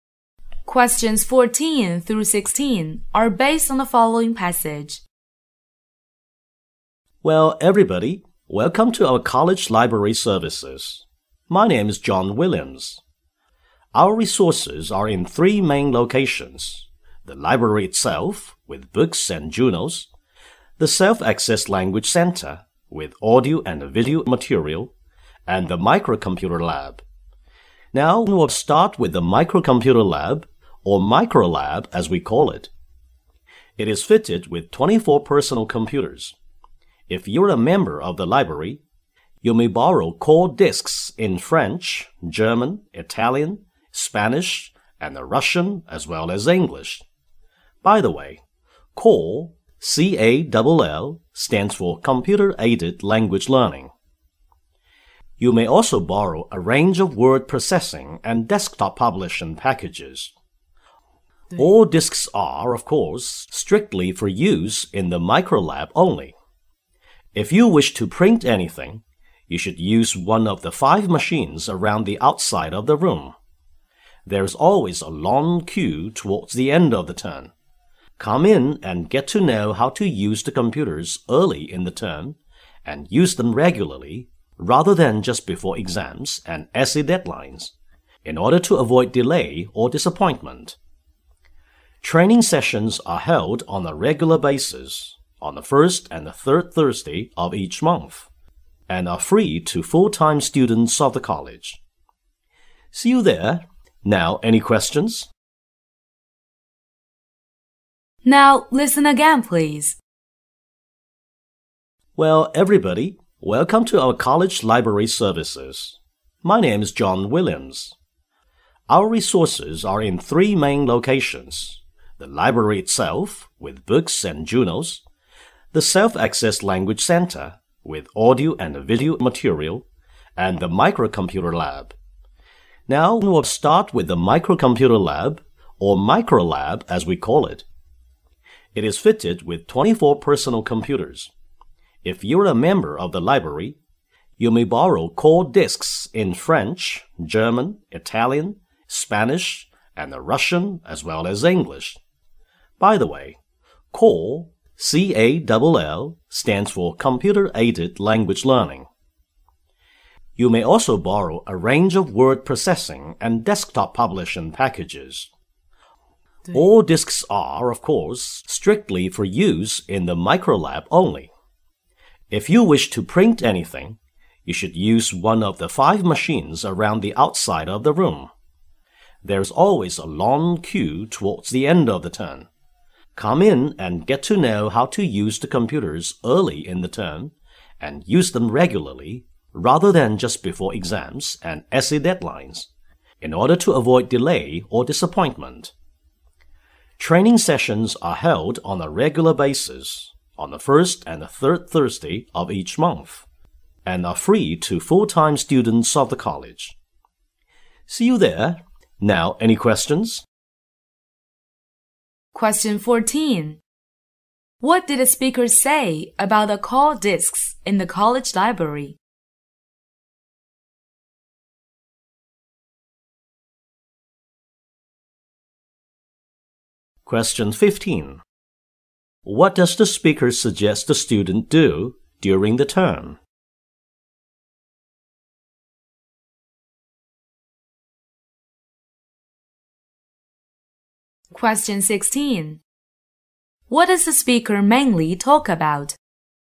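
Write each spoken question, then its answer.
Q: What does the speaker suggest the student do during the term?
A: Learn to use the computers early and use them regularly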